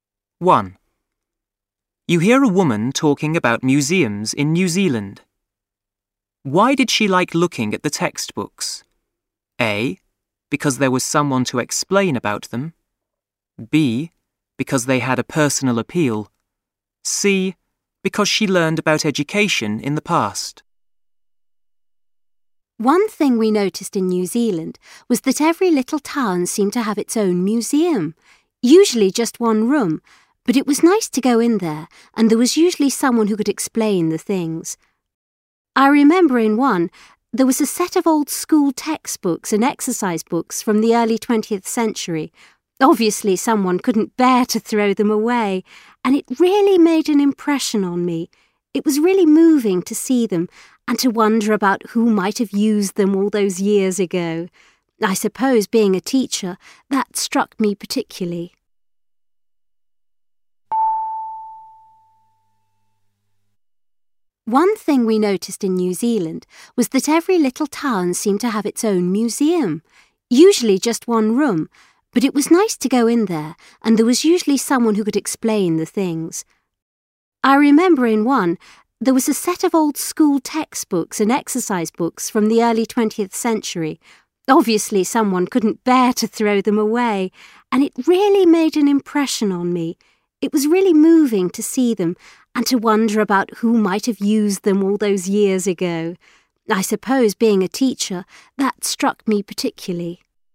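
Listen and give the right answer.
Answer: B: Because they had a personal appeal.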